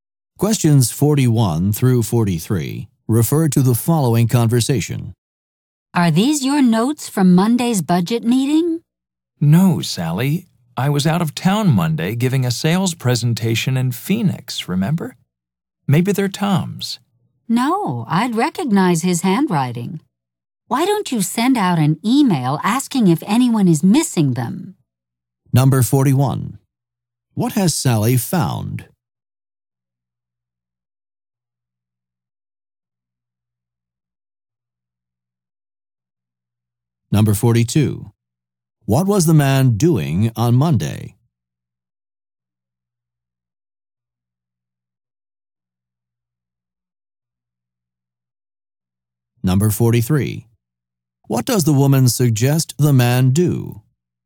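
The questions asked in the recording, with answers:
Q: What has Sally found?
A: Notes from Monday's budget meeting

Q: What was the man doing on Monday?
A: Giving a sales presentation in Phoenix

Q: What does the woman suggest the man do?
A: Send out an email asking if anyone is missing the notes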